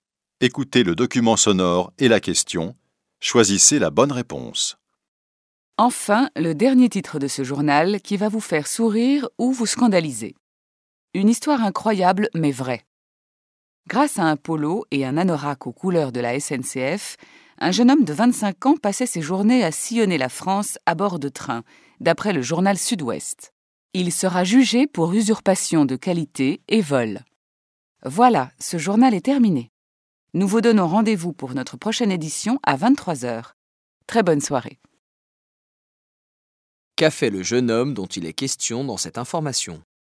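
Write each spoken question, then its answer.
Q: Qu'a fait le jeune homme dont il est question dans cette information ?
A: Il s'est fait passer pour un employé de la SNCF pour voyager en train à travers la France.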